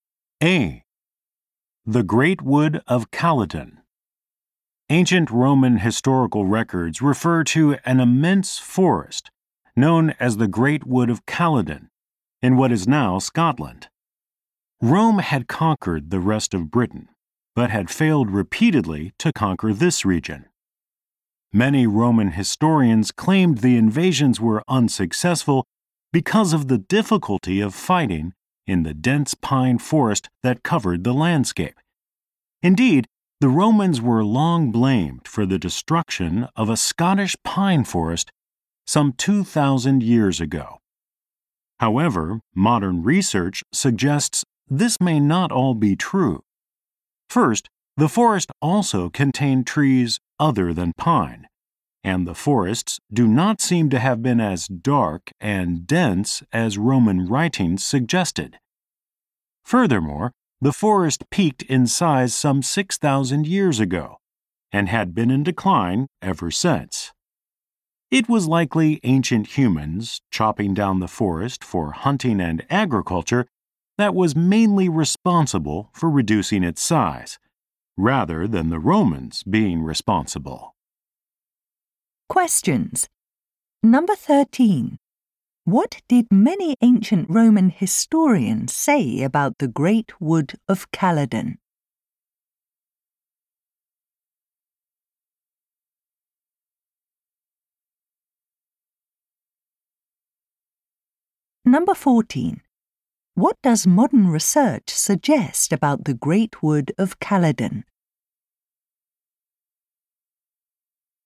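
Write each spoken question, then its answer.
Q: What did many ancient Roman historians say about the Great Wood of Calatin?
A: Its dense pine forest made Roman invasions unsuccessful

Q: What does modern research suggest about the Great Wood of Calatin?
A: Ancient humans, not the Romans, mainly reduced it; it had been declining for thousands of years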